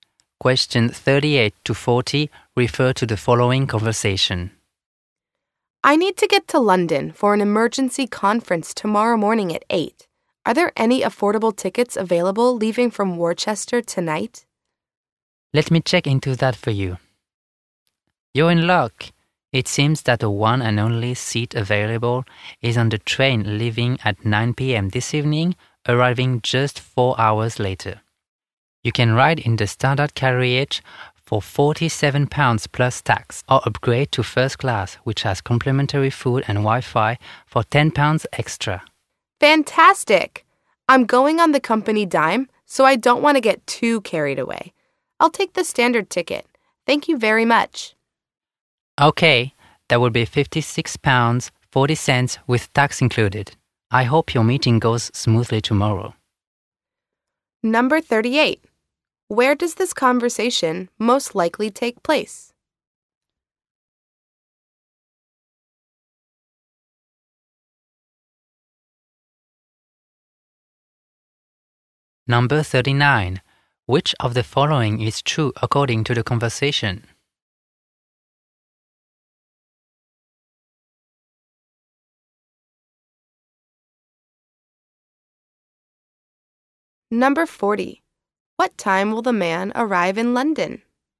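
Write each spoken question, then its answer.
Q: What time will the man arrive in London?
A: 1 a.m.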